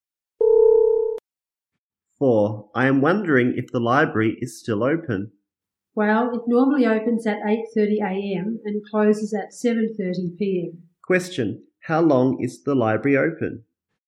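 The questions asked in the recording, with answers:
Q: Question, how long is the library open?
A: 11 hours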